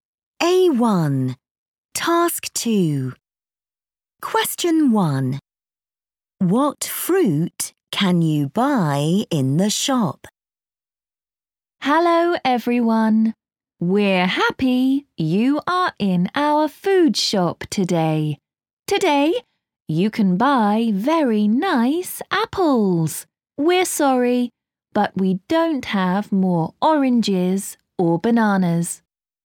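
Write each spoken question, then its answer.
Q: What fruit can you buy in the shop?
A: apples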